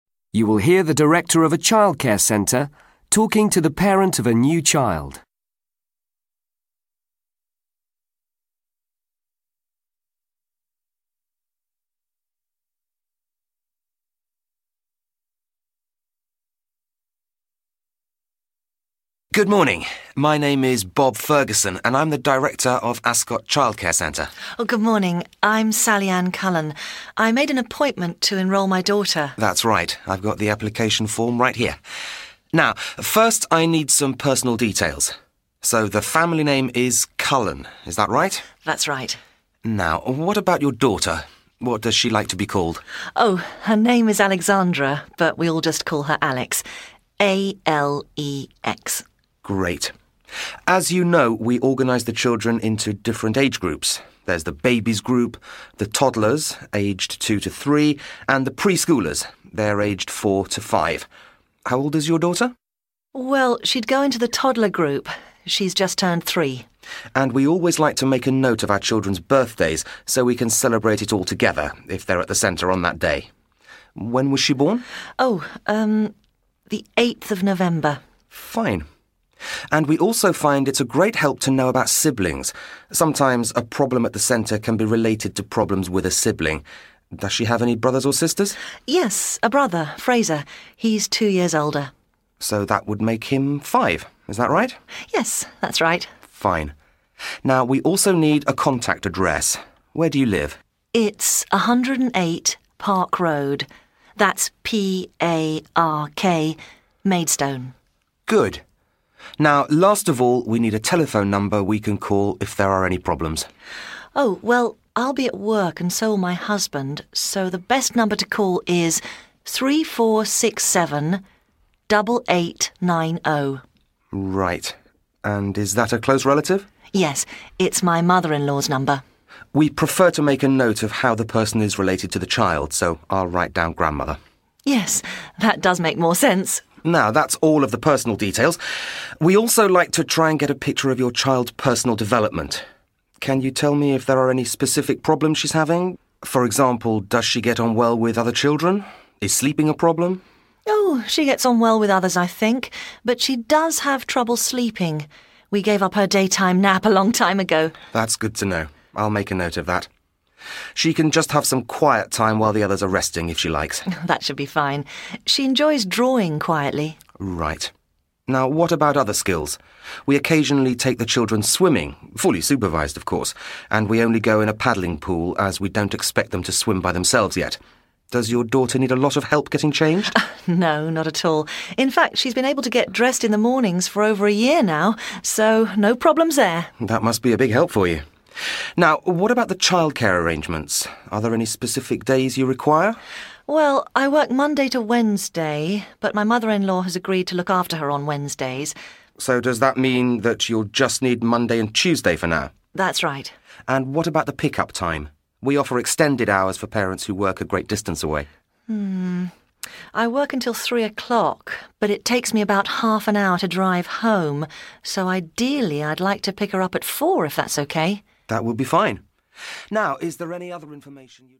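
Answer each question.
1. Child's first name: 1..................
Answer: Alex

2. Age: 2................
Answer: 3

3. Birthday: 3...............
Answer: 8 November

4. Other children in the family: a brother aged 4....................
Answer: 5

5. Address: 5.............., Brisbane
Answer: 108 Park Road

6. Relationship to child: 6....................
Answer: grandmother

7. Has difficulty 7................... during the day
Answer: sleeping

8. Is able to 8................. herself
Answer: dress

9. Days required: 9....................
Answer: Monday and Tuesday

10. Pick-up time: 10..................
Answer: 4 o'clock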